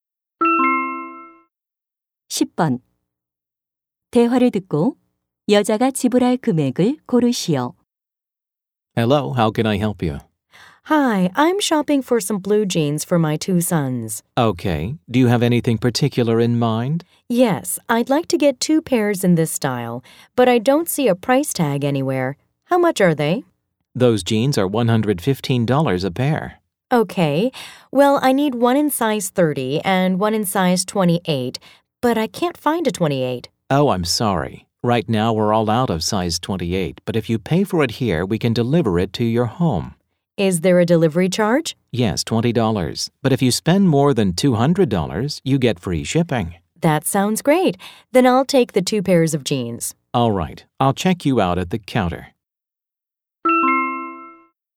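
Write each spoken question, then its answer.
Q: 대화를 듣고 여자가 지불할 금액을 고르시오.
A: $230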